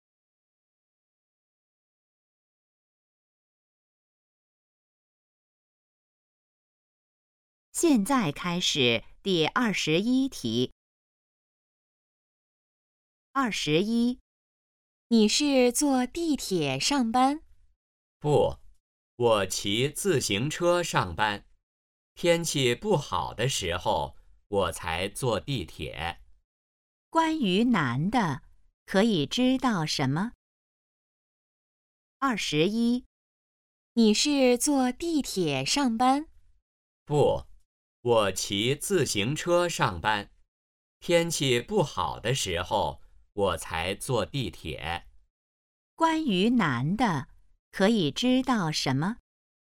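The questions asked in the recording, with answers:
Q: 关于男的,可以知道什么?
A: 他一般骑自行车上班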